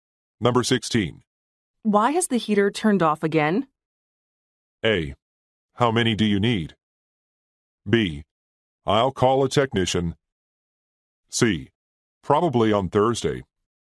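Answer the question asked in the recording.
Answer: B: I'll call a technician.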